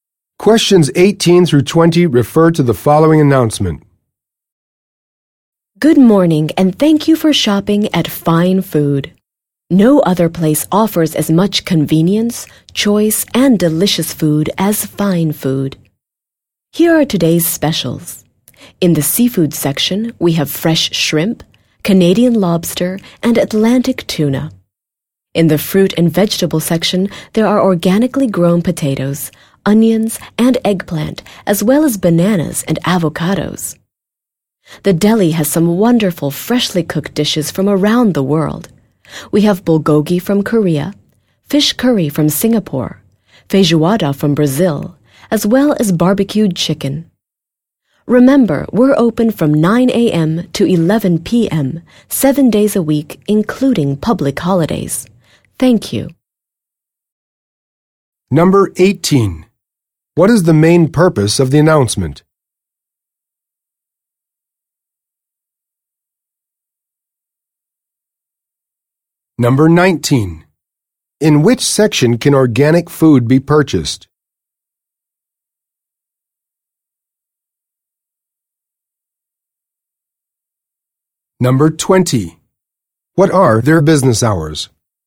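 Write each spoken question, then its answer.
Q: What is the main purpose of the announcement?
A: To announce today's specials

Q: In which section can organic food be purchased?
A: The fruit and vegetable section

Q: What are their business hours?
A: 9 a.m. to 11 p.m., 7 days a week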